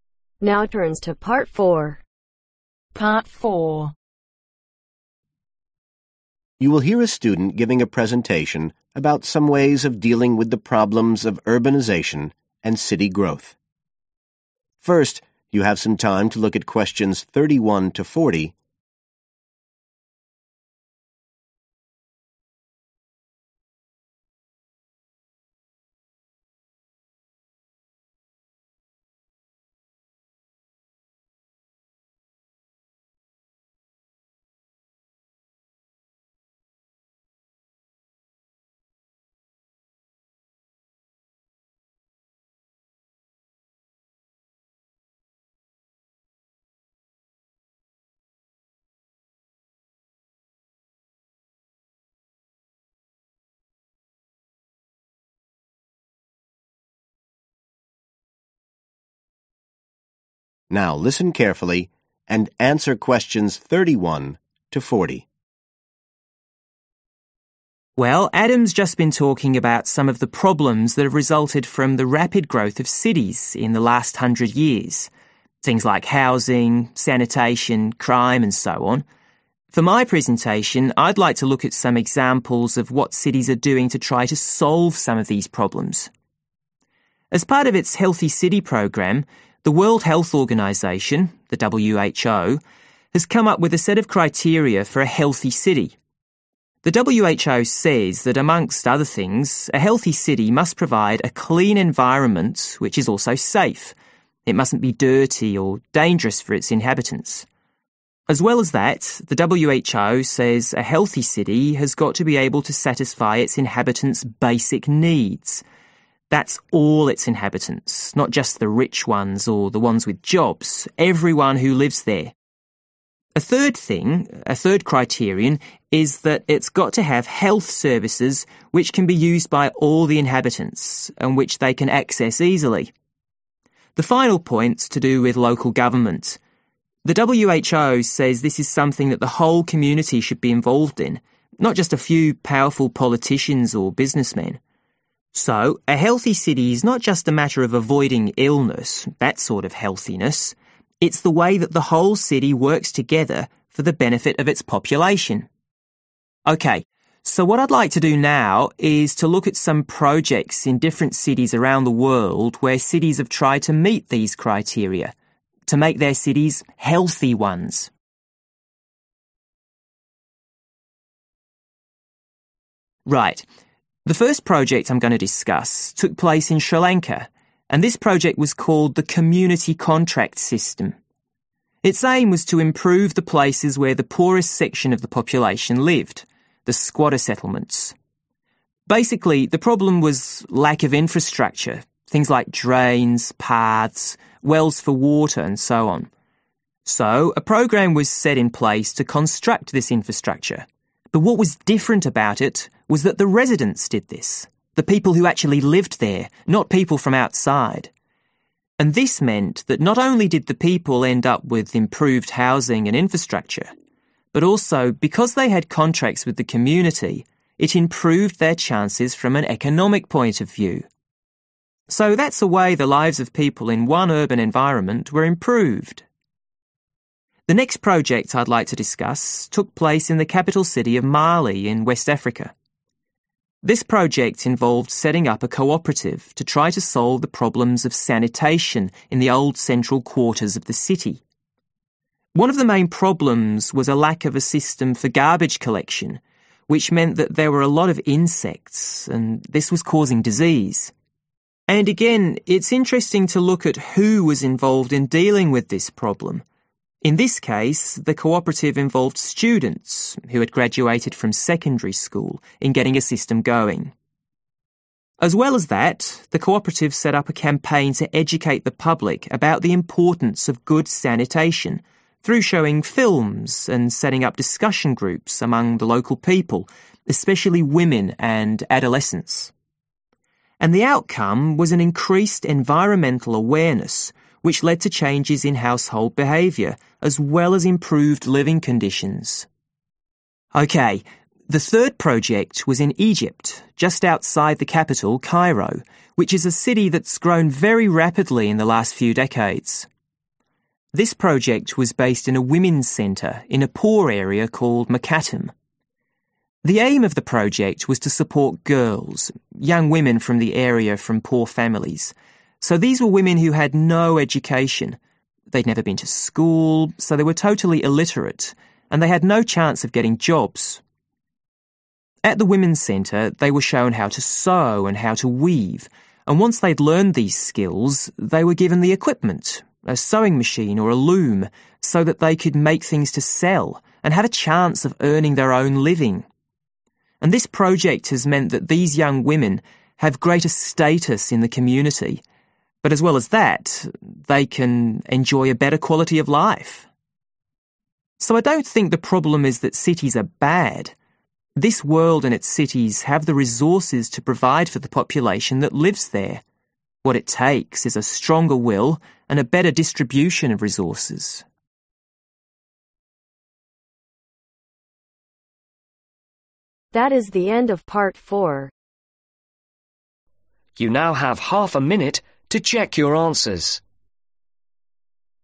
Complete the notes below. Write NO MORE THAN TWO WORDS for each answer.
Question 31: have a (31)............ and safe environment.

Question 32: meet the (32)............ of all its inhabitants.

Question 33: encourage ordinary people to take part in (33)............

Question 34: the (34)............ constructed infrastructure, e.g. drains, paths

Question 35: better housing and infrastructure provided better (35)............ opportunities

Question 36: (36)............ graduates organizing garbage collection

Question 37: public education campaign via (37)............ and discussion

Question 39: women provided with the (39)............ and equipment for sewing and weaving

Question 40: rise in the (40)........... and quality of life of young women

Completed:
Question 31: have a Clean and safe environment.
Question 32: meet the Basic needs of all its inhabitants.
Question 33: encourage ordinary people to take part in Local government
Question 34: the Residents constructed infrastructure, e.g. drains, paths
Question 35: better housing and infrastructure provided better Economic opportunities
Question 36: Secondary school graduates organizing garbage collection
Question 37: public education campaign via Films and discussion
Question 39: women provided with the Skills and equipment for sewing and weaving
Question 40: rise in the Status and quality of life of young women